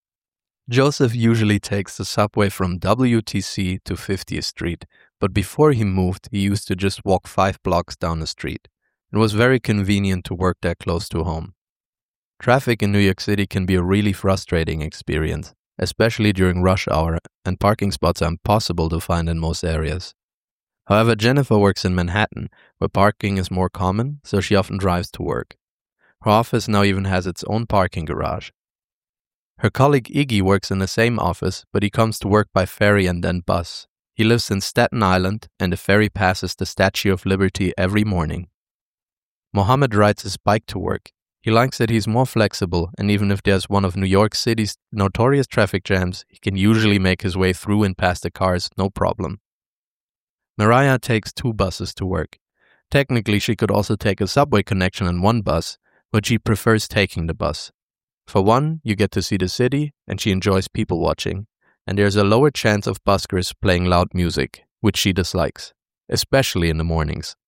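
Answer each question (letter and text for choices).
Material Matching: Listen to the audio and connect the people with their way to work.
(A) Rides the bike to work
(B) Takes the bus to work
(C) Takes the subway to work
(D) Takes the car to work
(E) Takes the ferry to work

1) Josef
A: (C) Takes the subway to work

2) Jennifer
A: (D) Takes the car to work

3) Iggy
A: (E) Takes the ferry to work

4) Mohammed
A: (A) Rides the bike to work

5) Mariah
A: (B) Takes the bus to work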